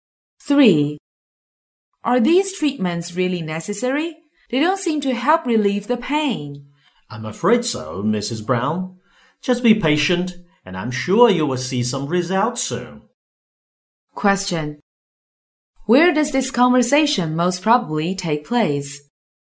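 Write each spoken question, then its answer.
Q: Where does this conversation most probably take place?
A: In a hospital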